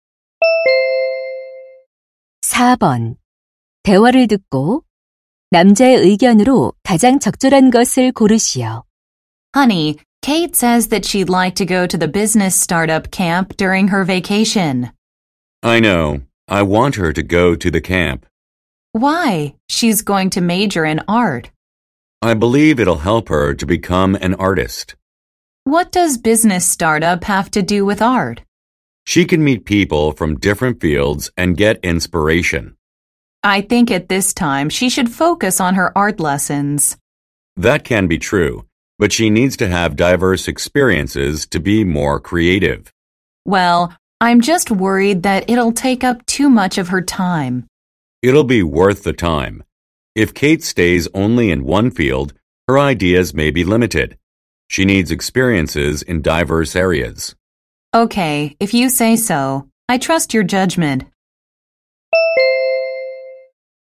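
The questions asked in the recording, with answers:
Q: 대화를 듣고 남자의 의견으로 가장 적절한 것을 고르시오.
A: 창의성을 위해 다양한 분야의 경험이 필요하다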